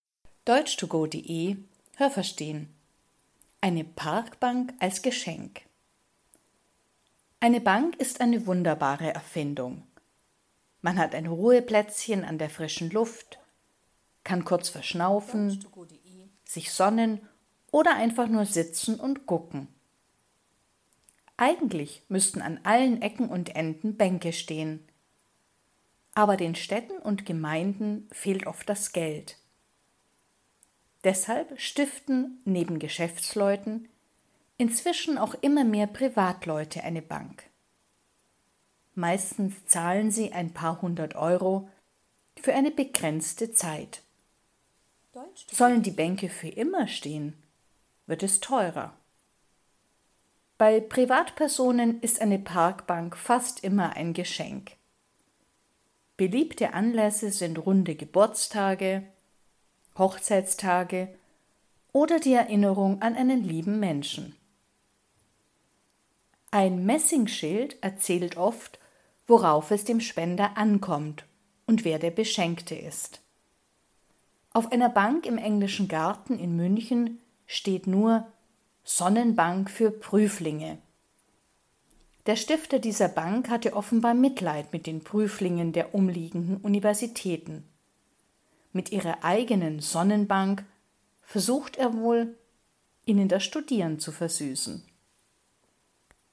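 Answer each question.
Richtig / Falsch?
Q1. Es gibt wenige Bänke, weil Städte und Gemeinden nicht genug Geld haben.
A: Richtig

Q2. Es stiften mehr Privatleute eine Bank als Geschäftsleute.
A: Falsch

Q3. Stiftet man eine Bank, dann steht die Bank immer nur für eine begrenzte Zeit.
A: Falsch

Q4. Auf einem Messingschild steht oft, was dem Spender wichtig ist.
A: Richtig

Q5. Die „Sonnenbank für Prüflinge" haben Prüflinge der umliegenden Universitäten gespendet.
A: Falsch

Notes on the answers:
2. Im Text heißt es nur: Nicht nur Geschäftsleute stiften eine Bank, sondern es gibt inzwischen auch immer mehr Privatleute, die das machen. Das heißt nur, die Zahl der Privatpersonen wächst.
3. Es ist auch möglich, eine Bank zu stiften, die für immer stehen soll.
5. Diese Bank hat jemand gespendet. der anscheinend Mitleid mit den Prüflingen der umliegenden Universitäten hatte.

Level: Hörtexte B (mittel)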